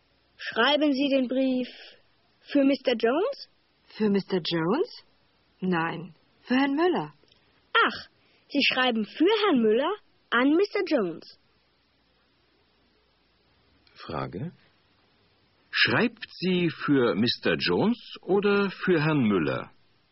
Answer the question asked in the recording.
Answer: Sie schreibt für Herrn Müller.